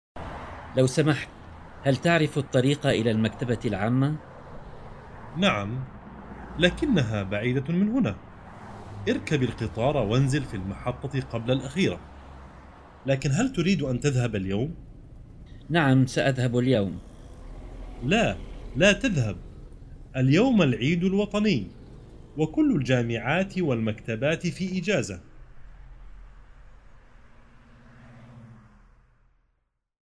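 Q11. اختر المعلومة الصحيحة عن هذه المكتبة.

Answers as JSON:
{"11": "المكتبة بعيدة ومغلقة اليوم بسبب العيد الوطني"}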